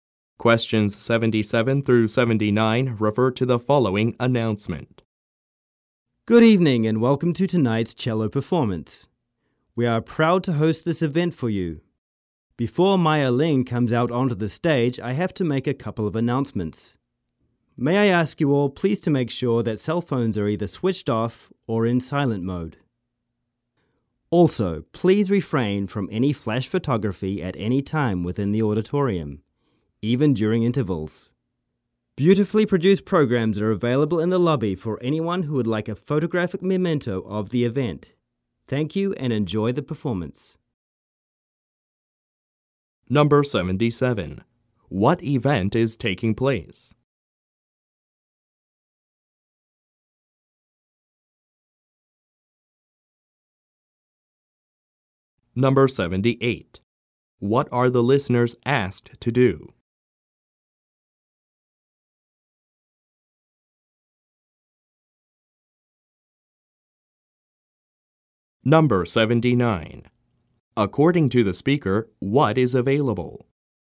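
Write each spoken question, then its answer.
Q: What event is taking place?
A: A cello performance

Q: What are the listeners asked to do?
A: Switch off cell phones or put them in silent mode (and avoid flash photography)

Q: According to the speaker, what is available?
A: Programs in the lobby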